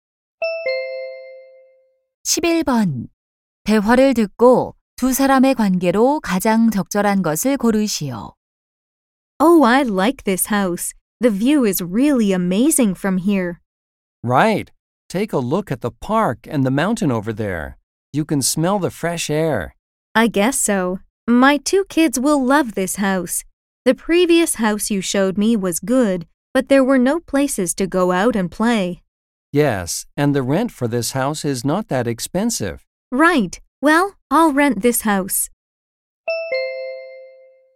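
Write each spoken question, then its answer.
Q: 대화를 듣고 두 사람의 관계로 가장 적절한 것을 고르시오.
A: 부동산 중개인 - 고객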